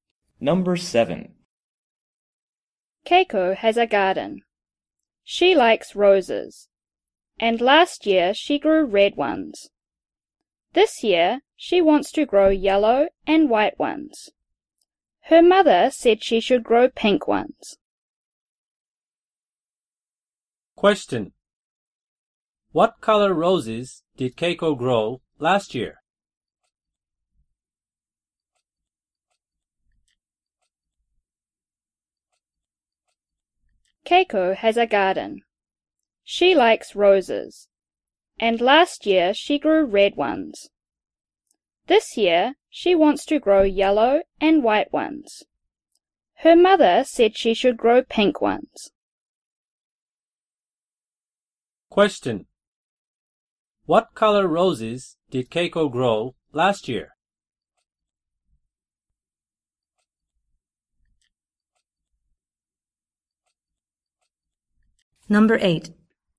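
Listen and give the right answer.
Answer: Red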